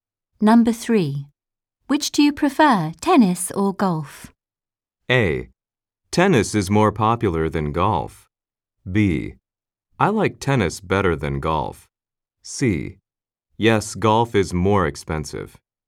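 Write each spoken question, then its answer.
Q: Which do you prefer, tennis or golf?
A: B: I like tennis better than golf.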